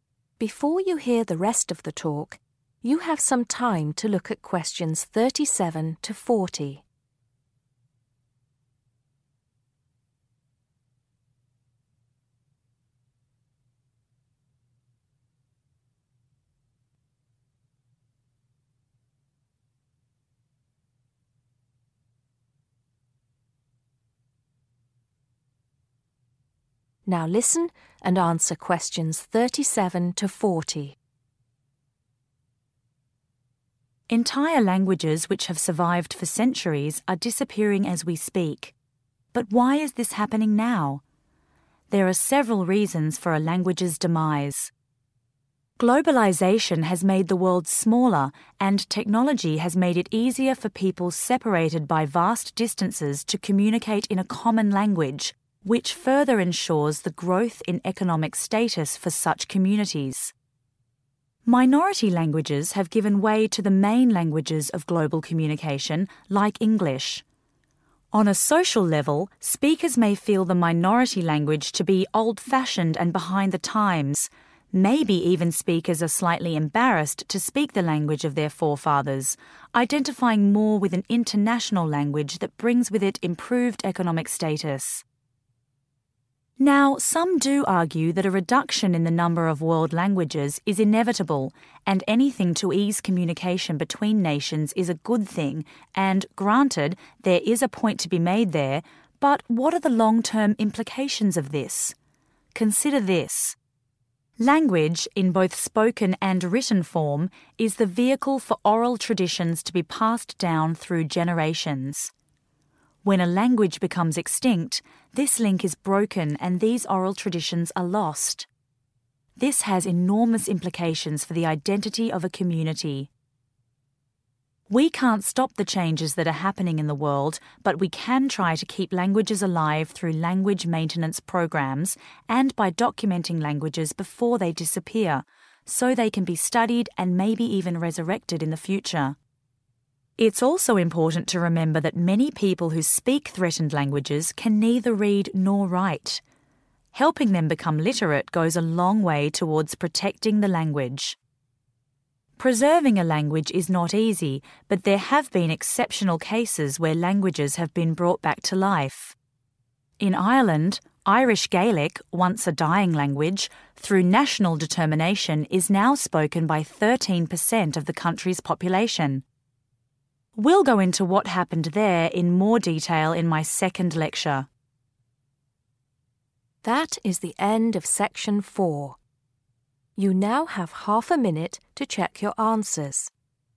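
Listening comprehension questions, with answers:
Complete the sentences below. Write NO MORE THAN TWO WORDS for each answer.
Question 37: Technology has made communication easier, encouraging the use of a............ .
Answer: common language

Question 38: Some speakers may associate major languages with better.................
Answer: economic status

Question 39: A group of people can lose their............... when their language becomes extinct.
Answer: identity

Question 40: We can help preserve languages through specific programmes and by encouraging people to become...................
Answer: literate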